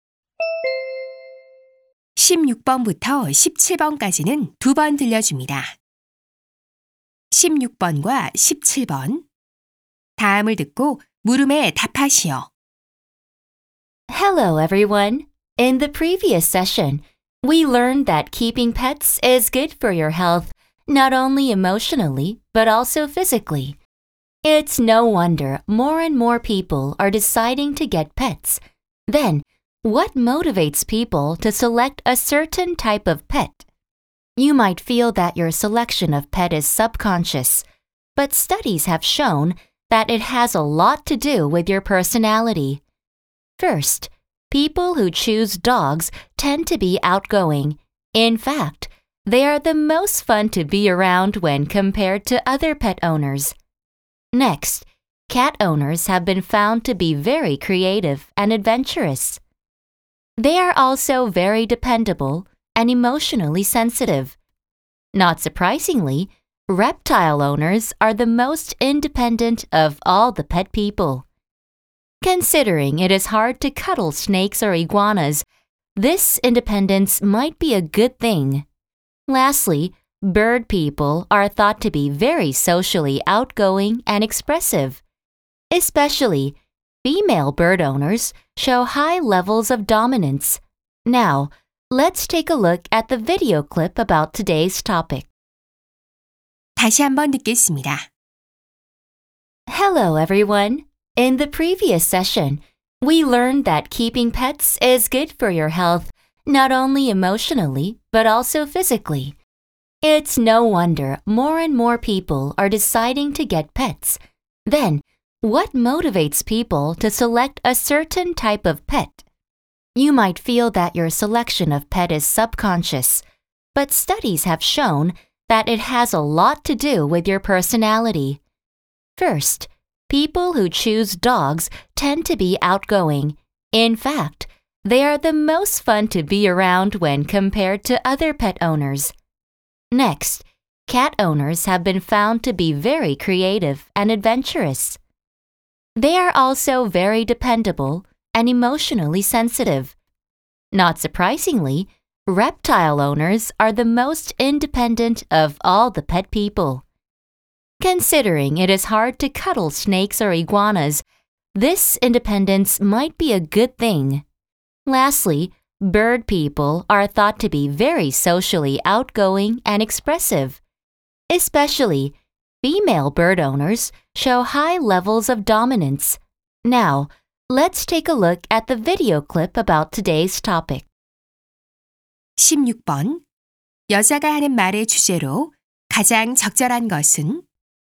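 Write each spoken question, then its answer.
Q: 여자가 하는 말의 주제로 가장 적절한 것은?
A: 성격과 애완동물 선택의 관계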